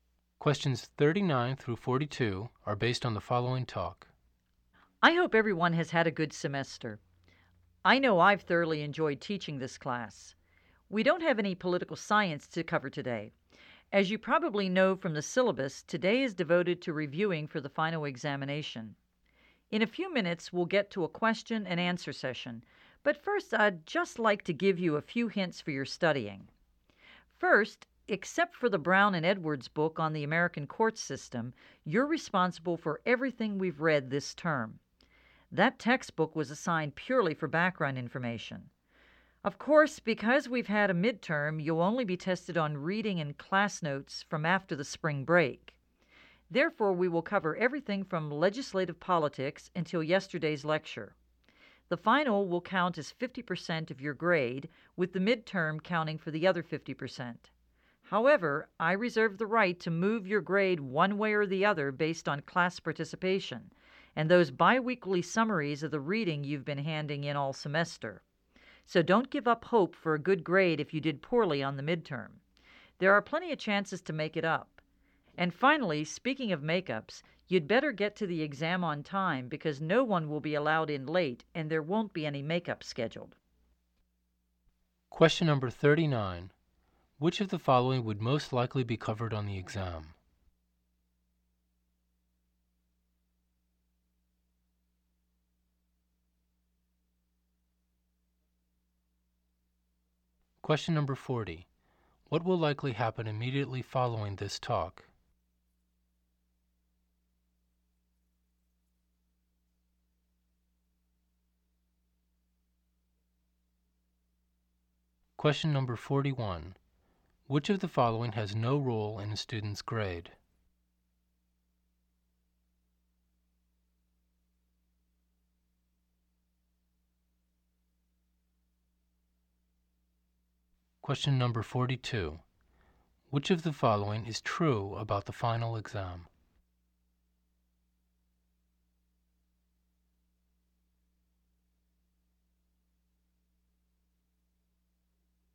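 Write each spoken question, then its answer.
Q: What will likely happen immediately following this talk?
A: A question and answer session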